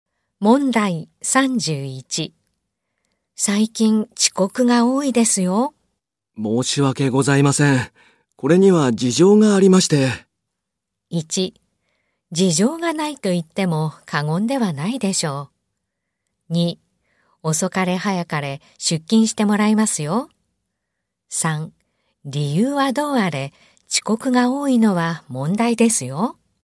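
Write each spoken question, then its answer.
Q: 最近遅刻が多いですよ。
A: 3: 理由はどうあれ、遅刻が多いのは問題ですよ。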